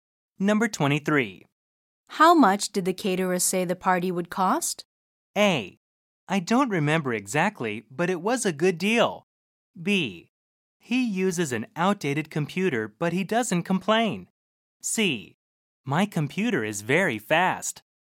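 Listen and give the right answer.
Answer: A: I don't remember exactly, but it was a good deal.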